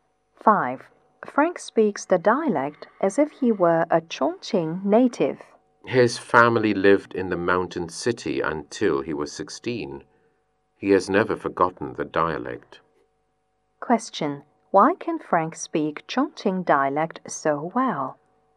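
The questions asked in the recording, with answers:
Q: Why can Frank speak Chongqing dialect so well?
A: His family lived in Chongqing until he was 16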